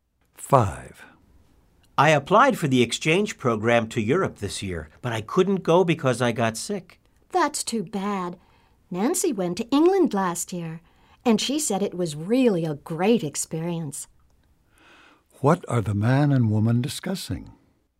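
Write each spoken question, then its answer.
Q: What are the man and woman discussing?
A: An exchange program to Europe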